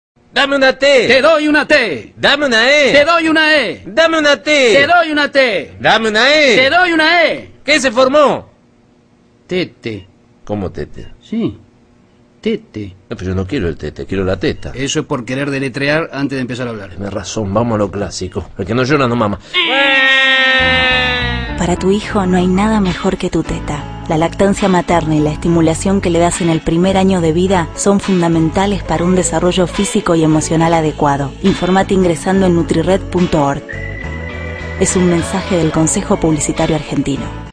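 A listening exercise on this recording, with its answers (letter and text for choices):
Ve el anuncio e indica la versión correcta.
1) Los dos bebés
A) se aburren.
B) tienen hambre.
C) pasan el rato jugando.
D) quieren salir de la cuna.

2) Forman una palabra a la manera de los cantos de las animadoras en el deporte (baloncesto, fútbol americano), pero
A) hacen un error al deletrearla.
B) no se ponen de acuerdo sobre qué palabra quieren formar.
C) se arrepienten en el último momento porque no quieren ser niños malos.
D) imitan lo que han visto en la tele, pero no tienen ninguna idea de qué están haciendo o por qué lo hacen.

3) Finalmente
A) se cansan del juego y se echan a llorar.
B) se enfadan.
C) deciden conseguir su objetivo de otra manera.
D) deciden volver a intentarlo al día siguiente.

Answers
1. B) tienen hambre.
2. A) hacen un error al deletrearla.
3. C) deciden conseguir su objetivo de otra manera.

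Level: 中级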